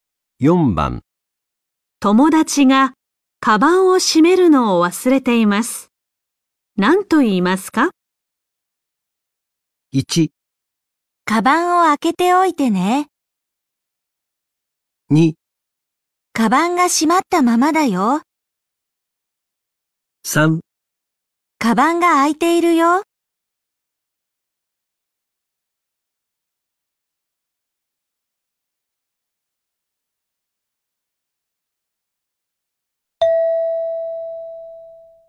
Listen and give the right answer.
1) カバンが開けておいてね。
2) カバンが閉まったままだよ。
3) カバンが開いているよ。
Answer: 3) カバンが開いているよ。

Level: N4 Listening · Test 1